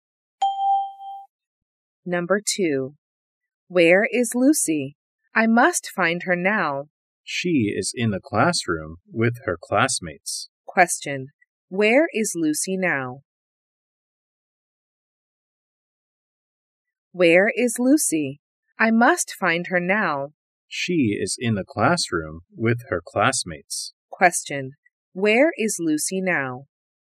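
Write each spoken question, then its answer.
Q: Where is Lucy now?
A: In the classroom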